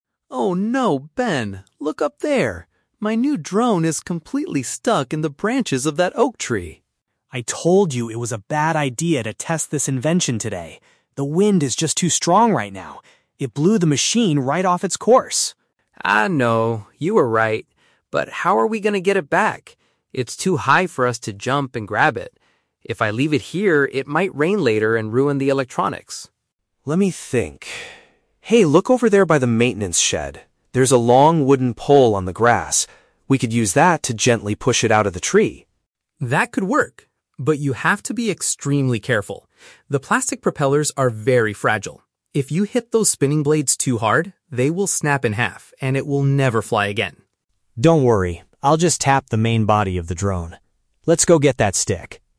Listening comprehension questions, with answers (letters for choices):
Listen to a conversation between two friends in a park. For each question, choose the correct answer (A, B, or C).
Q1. Why did the drone get stuck in the tree?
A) Because the battery suddenly ran out of power.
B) Because heavy air currents pushed it in the wrong direction.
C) Because Sam was trying to fly it over the tall branches.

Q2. What is their plan to retrieve the device?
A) To jump up and catch it with their bare hands.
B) To ask a park maintenance worker for assistance.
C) To use a tall piece of wood to move it down.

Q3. What is Sam most worried about damaging during the rescue?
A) The delicate parts that lift the machine in the air.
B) The expensive camera attached to the bottom.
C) The internal computer and electrical wires.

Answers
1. B
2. C
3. A

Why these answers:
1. Ben says, "The wind is just too strong right now. It blew the machine right off its course." Option (B) correctly paraphrases this ("heavy air currents" for "strong wind", "wrong direction" for "off its course"). Option (A) is a common drone problem but is not mentioned. Option (C) is a trap; the drone is in the branches, but Sam didn't purposefully try to fly it over them.
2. Ben suggests using a "long wooden pole" to "gently push it out of the tree." Option (C) uses synonyms ("tall piece of wood" for "long wooden pole"). Option (A) is a trap; Sam says, "It's too high for us to jump and grab it," meaning they cannot do this. Option (B) is a trap; they see the pole near a "maintenance shed," but they do not look for a worker.
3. Sam warns Ben to be careful because "The plastic propellers are very fragile," and if they break, "it will never fly again." Option (A) paraphrases "propellers" as "parts that lift the machine" and "fragile" as "delicate." Option (B) is a trap; many drones have cameras, but it is not mentioned here. Option (C) is a trap; Sam worries that rain might ruin the electronics, not the rescue attempt with the pole.

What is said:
Sam: Oh no, Ben! Look up there. My new drone is completely stuck in the branches of that oak tree.
Ben: I told you it was a bad idea to test this invention today. The wind is just too strong right now. It blew the machine right off its course.
Sam: I know, you were right. But how are we going to get it back? It's too high for us to jump and grab it. If I leave it here, it might rain later and ruin the electronics.
Ben: Let me think... Hey, look over there by the maintenance shed. There's a long wooden pole on the grass. We could use that to gently push it out of the tree.
Sam: That could work. But you have to be extremely careful. The plastic propellers are very fragile. If you hit those spinning blades too hard, they will snap in half, and it will never fly again.